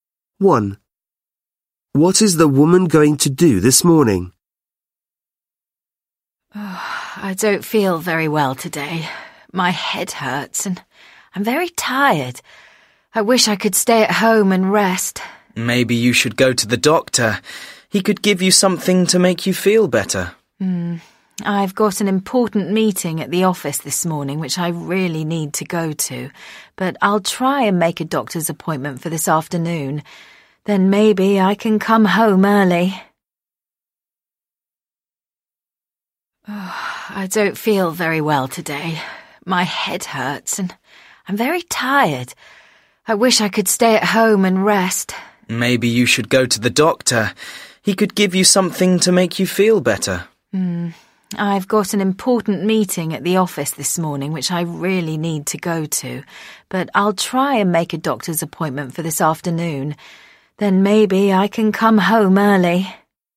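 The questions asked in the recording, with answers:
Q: What is the woman going to do this morning?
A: Go to an important meeting at the office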